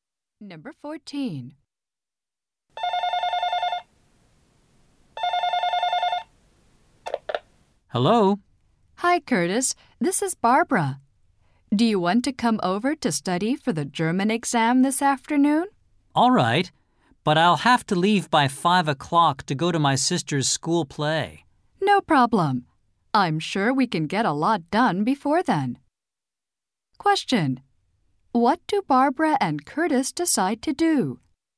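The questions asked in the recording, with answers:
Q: Question. What do Barbara and Curtis decide to do?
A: Study for the German exam together.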